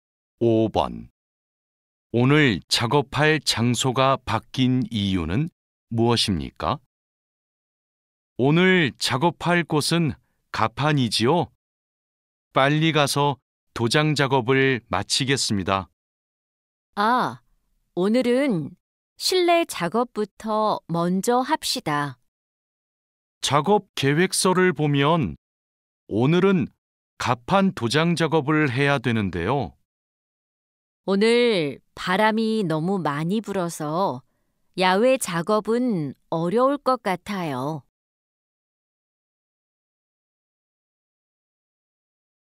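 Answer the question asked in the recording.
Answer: 바람이 너무 많이 불어서 야외 작업이 어려워서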